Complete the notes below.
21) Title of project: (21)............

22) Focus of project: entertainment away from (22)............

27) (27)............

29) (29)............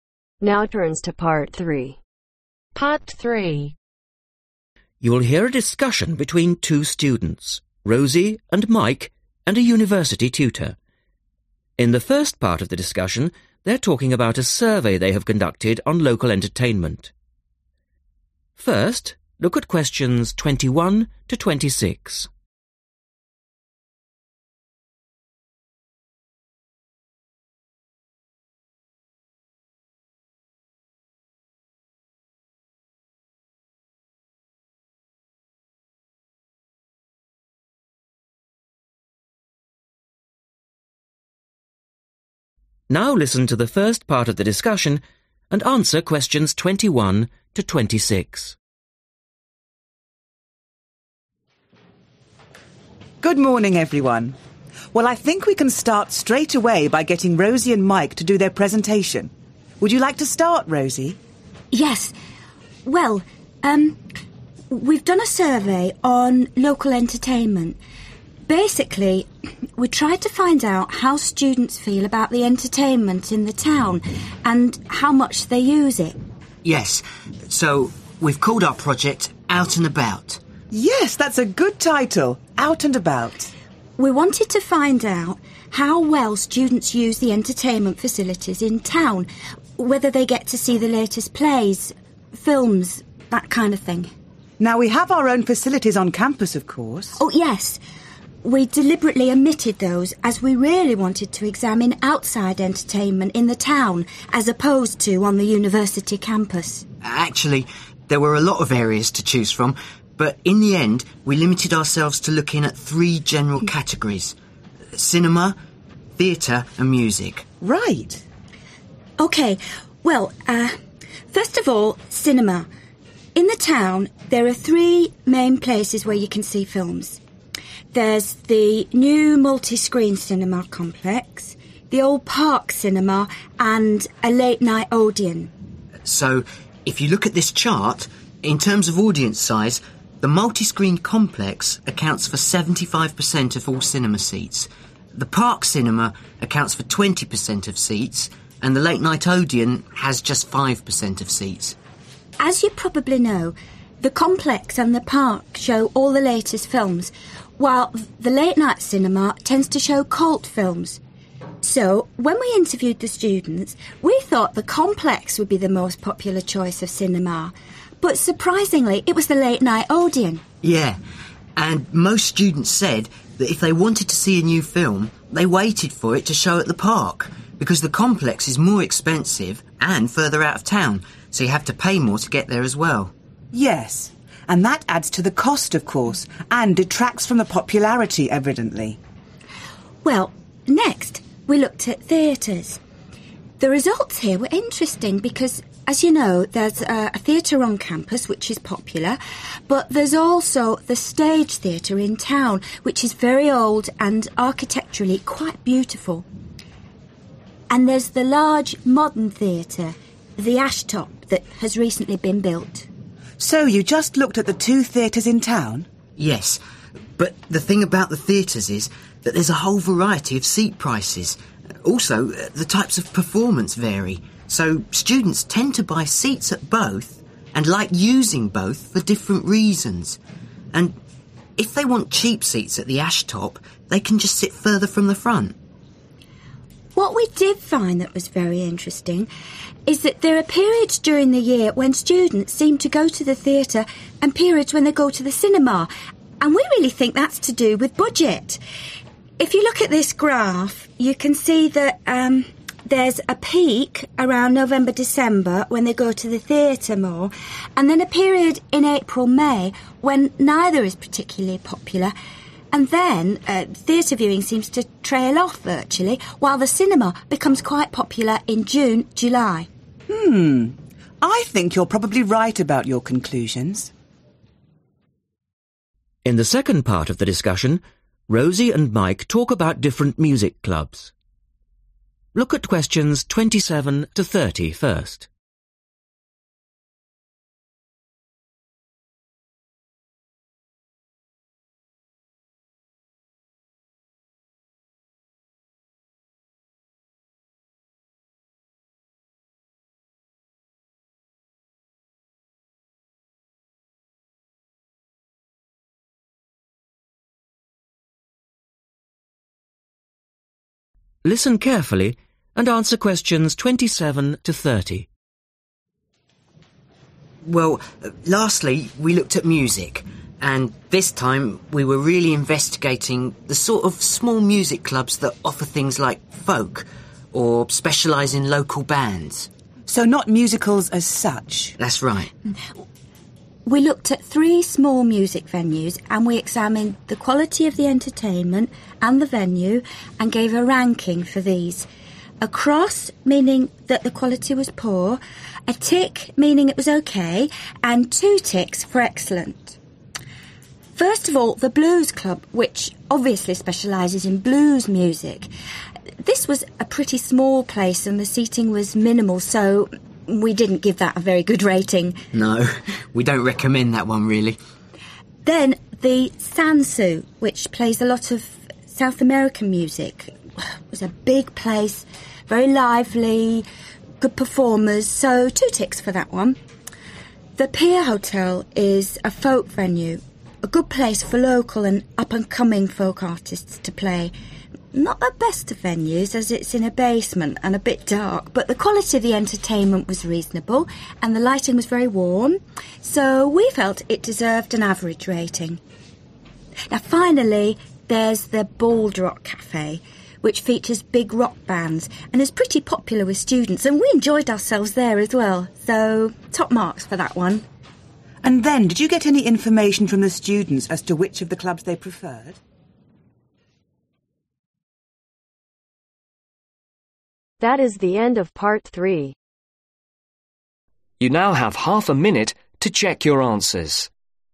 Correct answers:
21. Out and about
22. (the) university/campus
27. Poor
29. OK